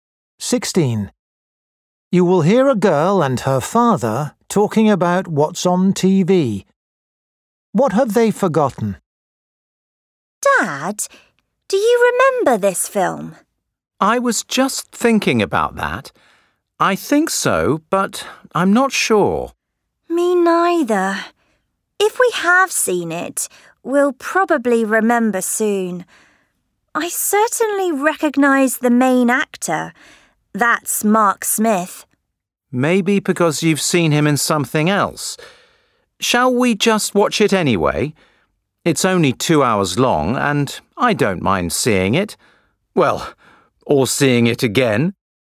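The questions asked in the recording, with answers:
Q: What have they forgotten?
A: whether they have seen the film before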